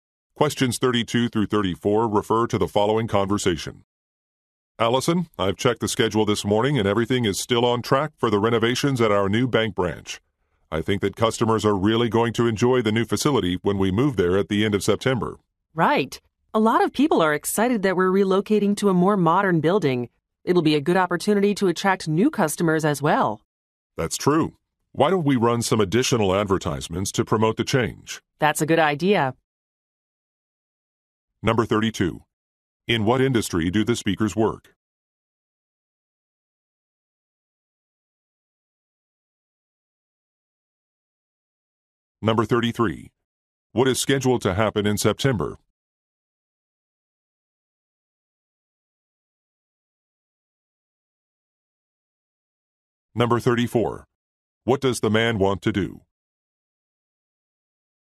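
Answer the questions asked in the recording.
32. Banking
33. The branch will move to a new building
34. Run additional advertisements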